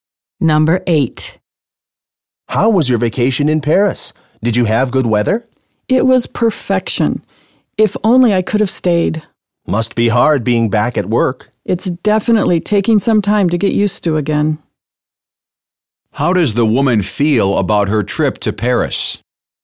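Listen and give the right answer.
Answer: It was perfect; she wishes she could have stayed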